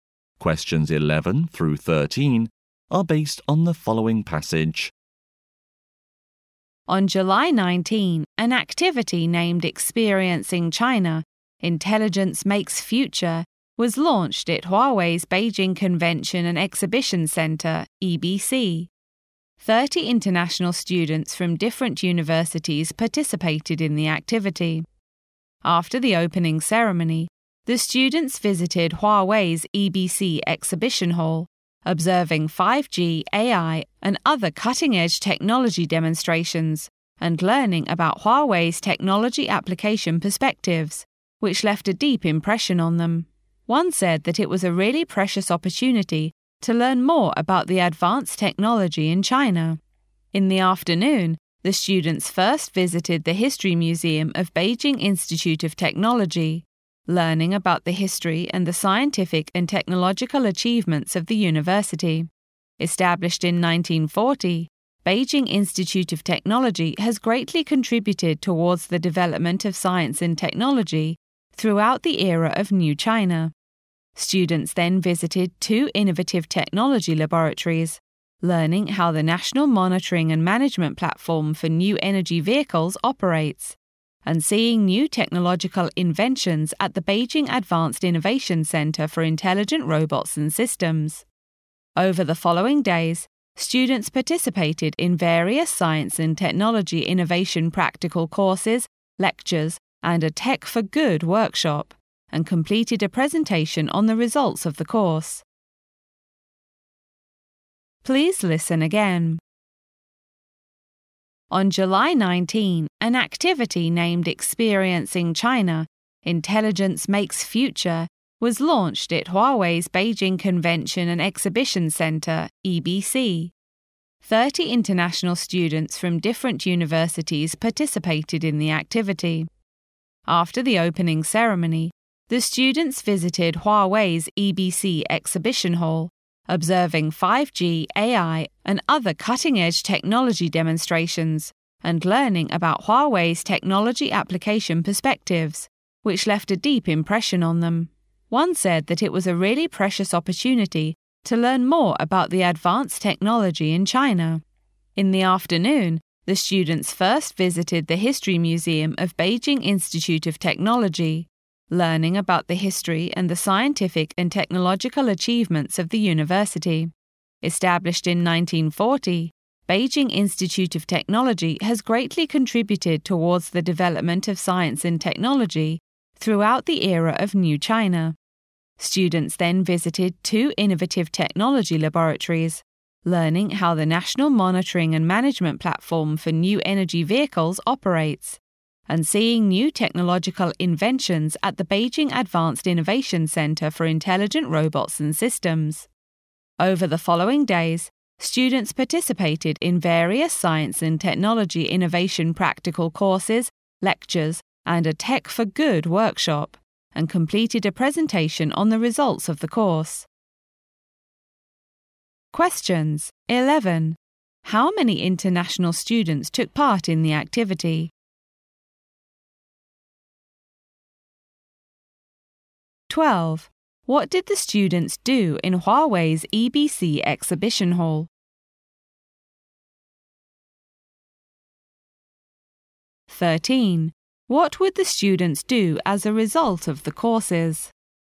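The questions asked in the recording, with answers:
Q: How many international students took part in the activity?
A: 30

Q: What did the students do in Huawei's EBC Exhibition Hall?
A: Observed 5G, AI and other cutting-edge technology demonstrations

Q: What would the students do as a result of the courses?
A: Complete a presentation on the results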